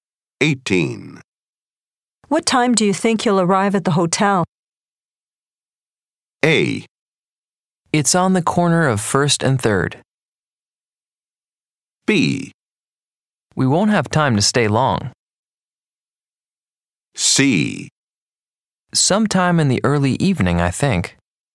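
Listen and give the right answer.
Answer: C: Sometime in the early evening, I think.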